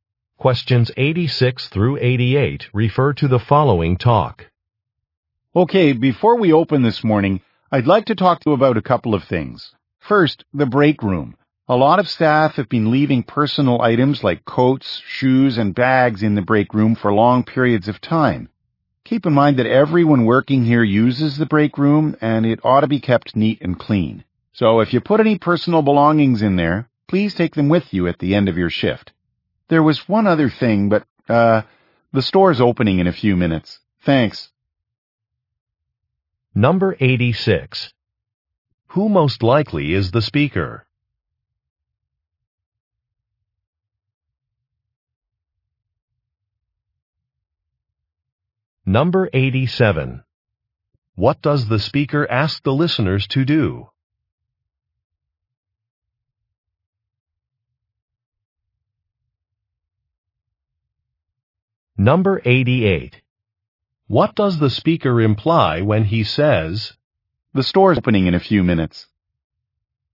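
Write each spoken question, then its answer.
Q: What does the speaker ask the listeners to do?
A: Take personal belongings out of the break room at the end of their shift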